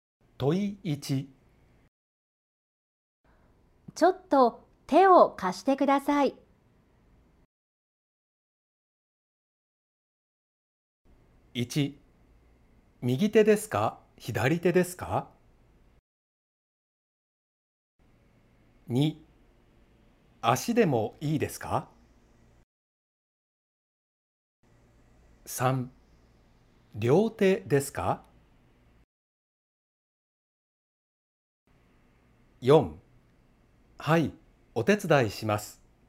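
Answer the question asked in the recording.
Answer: 4: はい、お手伝いします。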